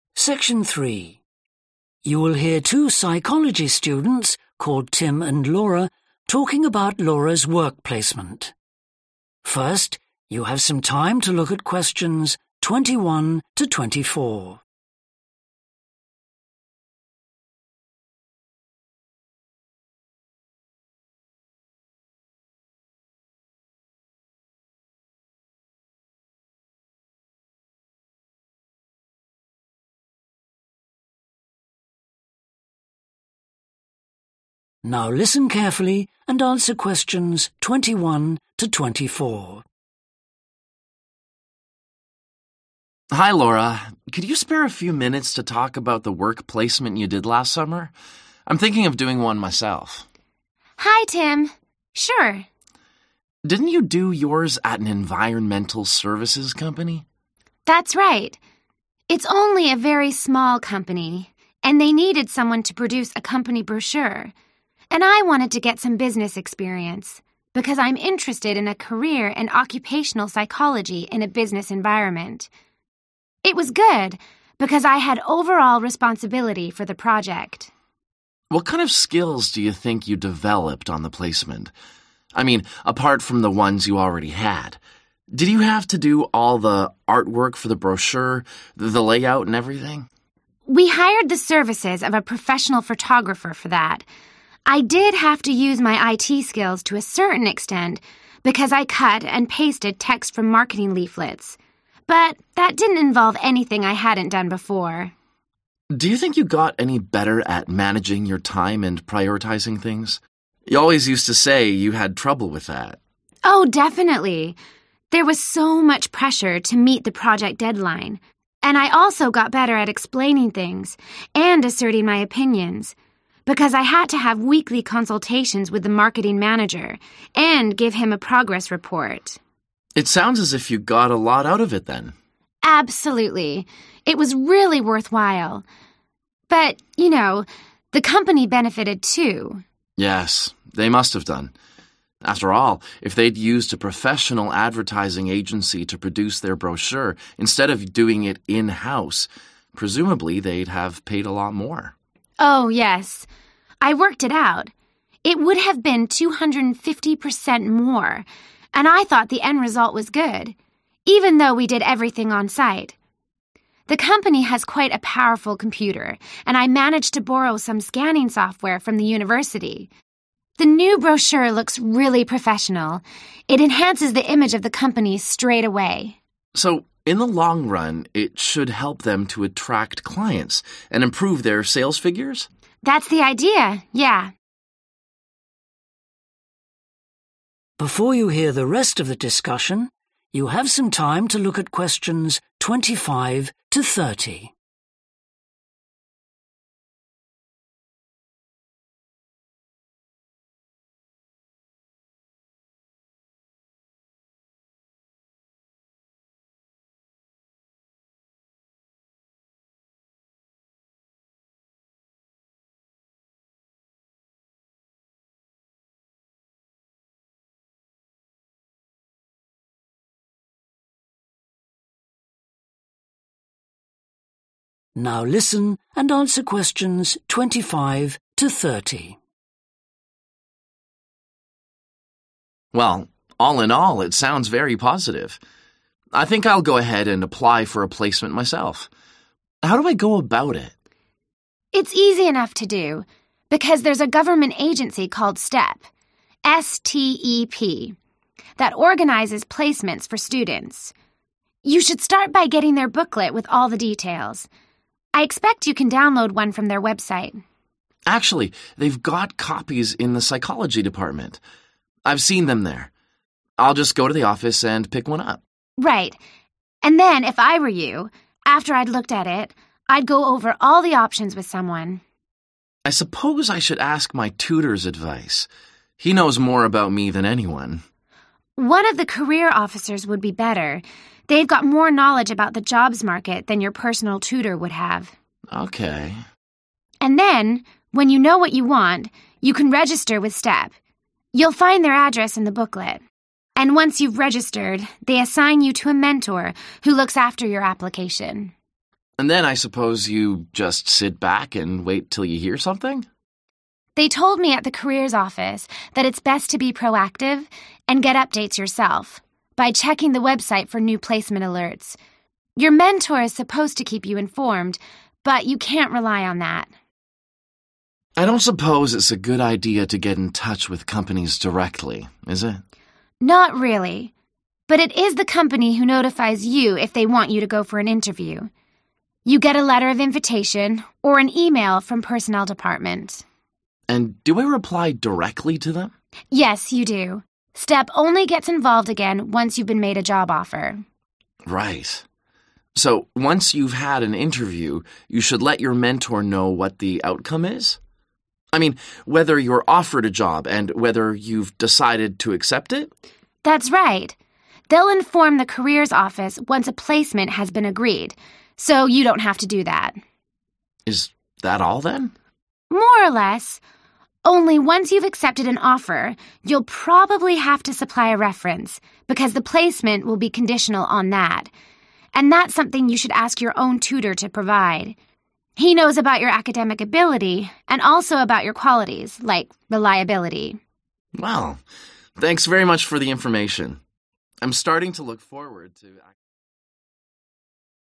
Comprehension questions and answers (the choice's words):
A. company manager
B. company's personnel department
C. personal tutor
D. psychology department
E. mentor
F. university careers officer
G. internet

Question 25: obtaining booklet:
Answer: psychology department

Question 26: discussing options:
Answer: university careers officer

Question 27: getting updates:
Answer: internet

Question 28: responding to invitation for interview:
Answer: company's personnel department

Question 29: informing about outcome of interview:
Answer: mentor

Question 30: requesting a reference:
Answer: personal tutor

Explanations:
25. they've got copies in the psychology department – I've seen them there.